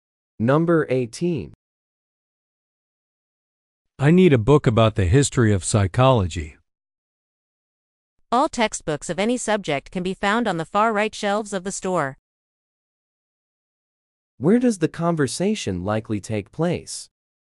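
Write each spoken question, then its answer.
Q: Where does the conversation likely take place?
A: In a bookstore.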